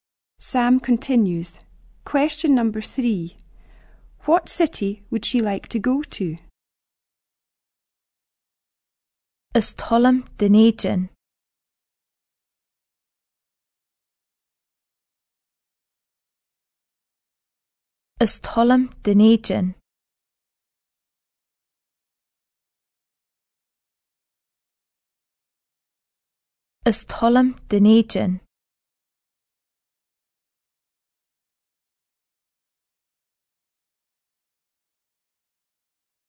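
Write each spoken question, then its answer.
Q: What city would she like to go to?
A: Edinburgh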